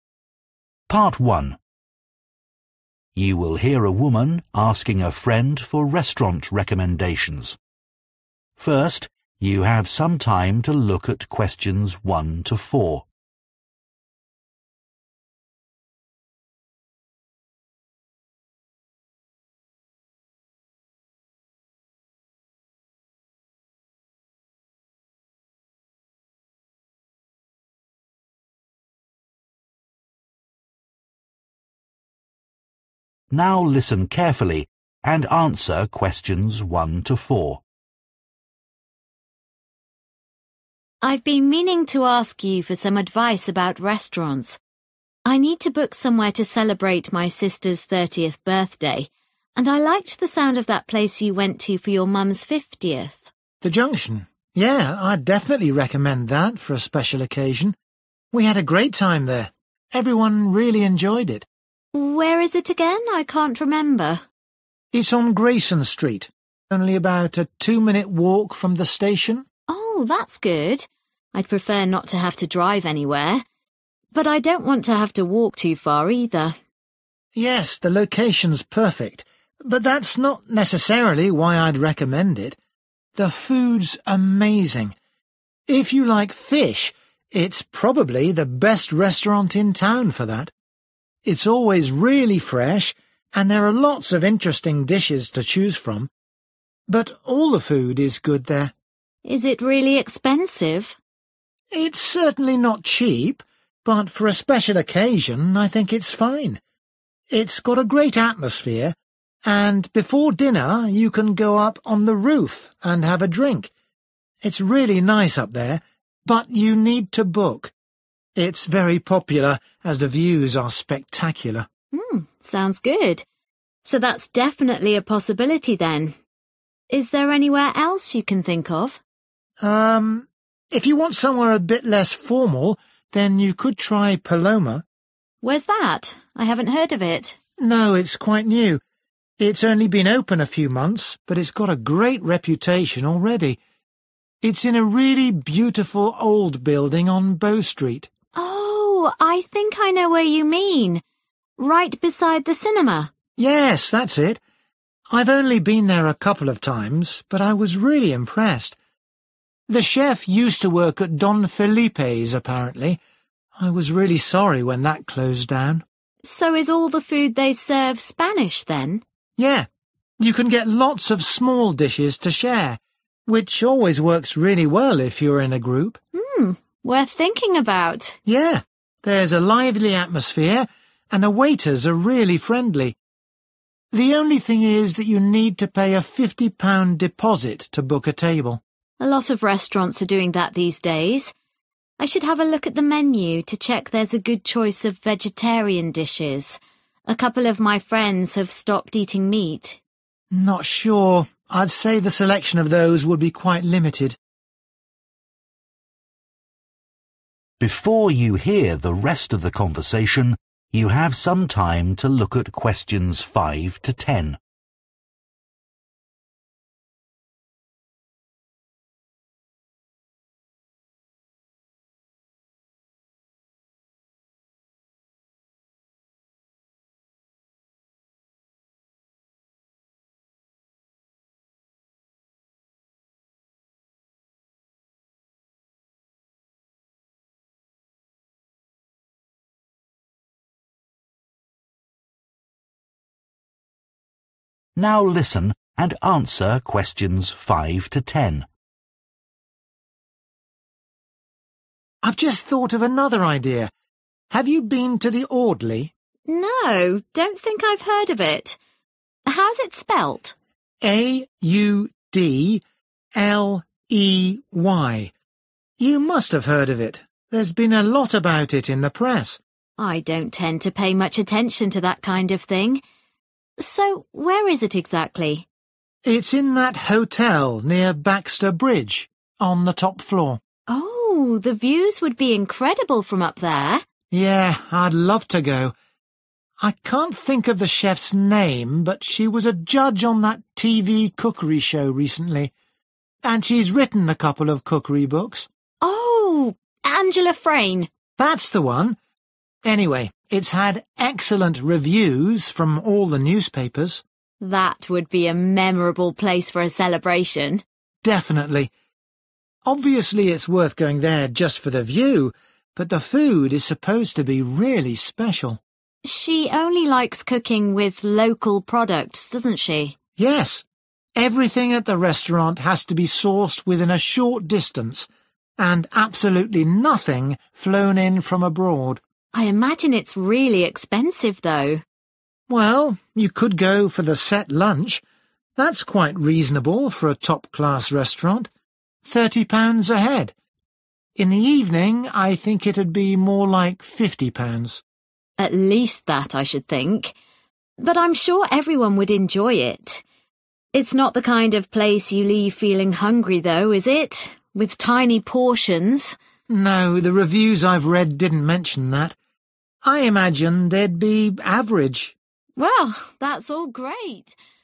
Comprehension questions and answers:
Complete the table below. Write ONE WORD AND/OR A NUMBER for each answer.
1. Good for people who are especially keen on 1............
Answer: fish

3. 3............food, good for sharing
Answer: Spanish

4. A limited selection of 4............ on the menu.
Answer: vegetarian

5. The 5............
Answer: Audley

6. At the top of a 6............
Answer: hotel

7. All the 7............ are very good.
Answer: reviews

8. Only uses 8......... ingredients.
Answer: local

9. Set lunch costs 9............per person.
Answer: 30/thirty

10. Portions probably of 10............size.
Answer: average